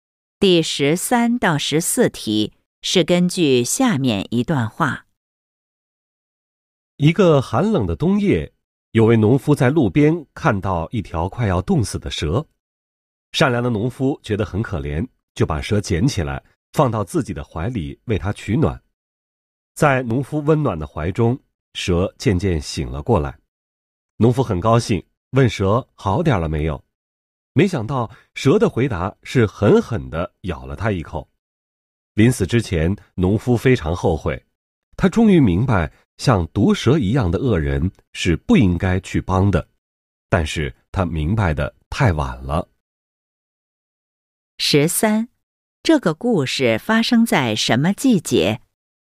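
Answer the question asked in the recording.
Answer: 冬天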